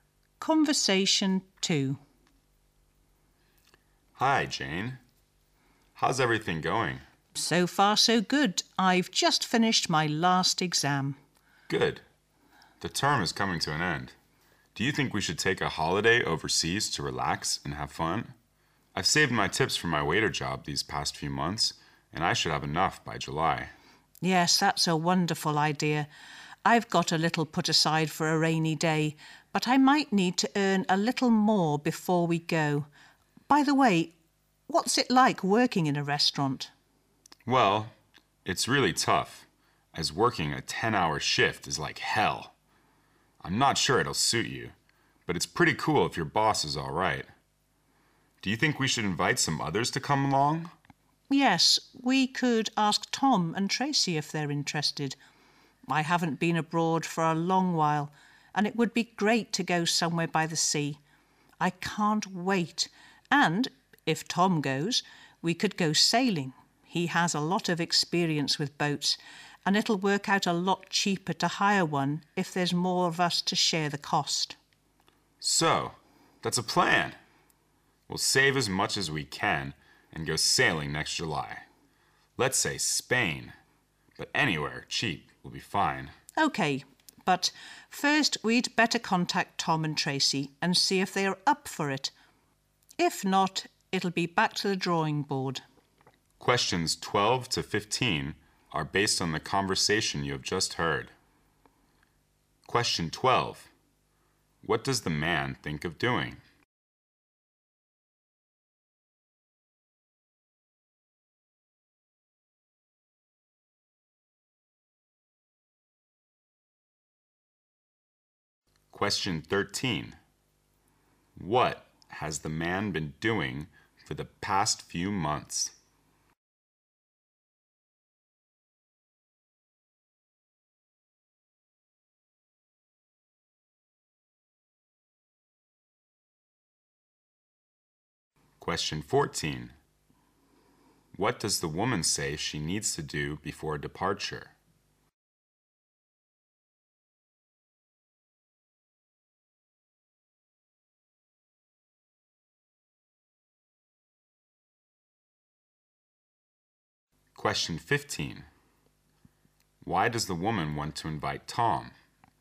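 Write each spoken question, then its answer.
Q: What does the man think of doing?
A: Taking a holiday overseas

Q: What has the man been doing for the past few months?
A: Working as a waiter and saving his tips

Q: What does the woman say she needs to do before departure?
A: Earn a little more money

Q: Why does the woman want to invite Tom?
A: He has a lot of experience with boats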